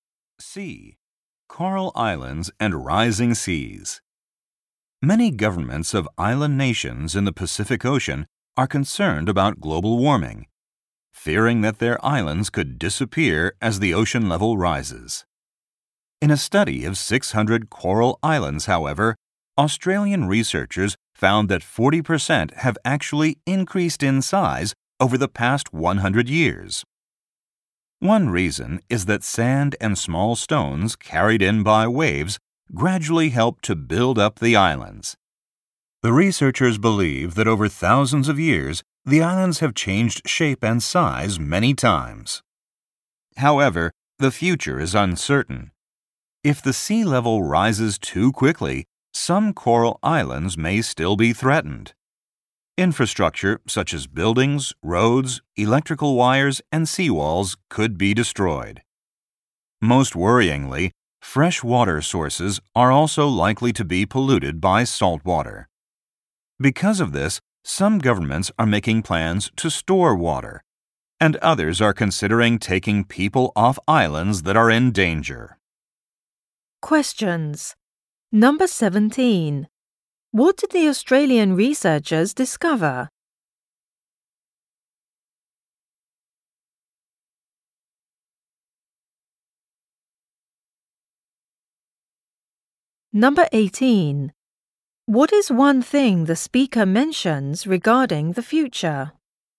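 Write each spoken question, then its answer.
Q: What did the Australian researchers discover?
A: 40% of the coral islands have grown in size over the past 100 years.

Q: What is one thing the speaker mentions regarding the future?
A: If the sea rises quickly, fresh water sources may be polluted by salt water.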